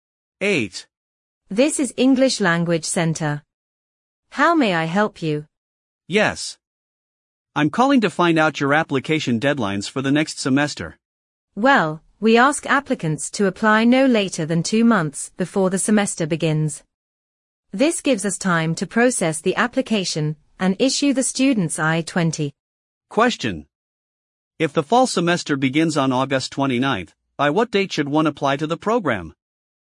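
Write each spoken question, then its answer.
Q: If the fall semester begins on August 29th, by what date should one apply to the program?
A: By June 29th.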